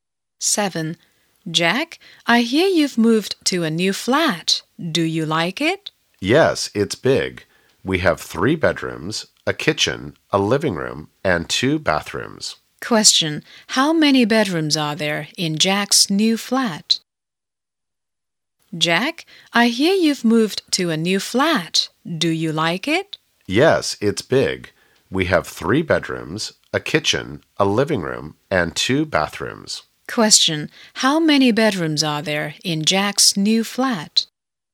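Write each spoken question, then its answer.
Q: how many bedrooms are there in Jack's new flat?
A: Three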